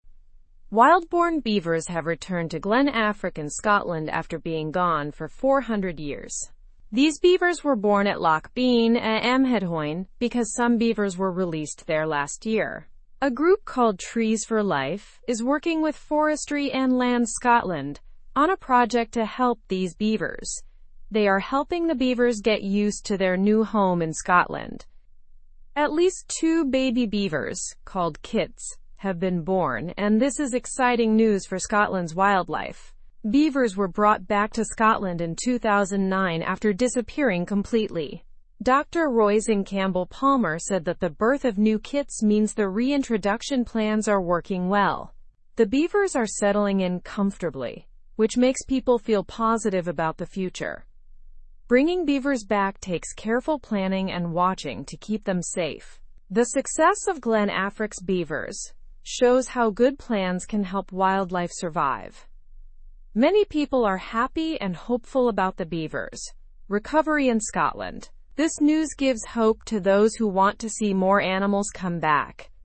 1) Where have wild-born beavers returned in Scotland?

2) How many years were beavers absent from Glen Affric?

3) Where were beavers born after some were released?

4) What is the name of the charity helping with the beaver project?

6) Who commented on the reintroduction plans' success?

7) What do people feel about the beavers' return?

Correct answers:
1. They have returned to Glen Affric.
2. They were absent for 400 years.
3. They were born at Loch Beinn a Mheadhoin.
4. The charity is called Trees for Life.
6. Dr. Roisin Campbell-Palmer commented on it.
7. People feel excited and hopeful.

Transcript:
Wild-born beavers have returned to Glen Affric in Scotland after being gone for 400 years. These beavers were born at Loch Beinn a Mheadhoin because some beavers were released there last year. A group called Trees for Life is working with Forestry and Land Scotland on a project to help these beavers. They are helping the beavers get used to their new home in Scotland.
At least two baby beavers, called kits, have been born, and this is exciting news for Scotland's wildlife. Beavers were brought back to Scotland in 2009 after disappearing completely. Dr. Roisin Campbell-Palmer said that the birth of new kits means the reintroduction plans are working well. The beavers are settling in comfortably, which makes people feel positive about the future.
Bringing beavers back takes careful planning and watching to keep them safe. The success of Glen Affric's beavers shows how good plans can help wildlife survive. Many people are happy and hopeful about the beavers' recovery in Scotland. This news gives hope to those who want to see more animals come back.

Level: (Level 2)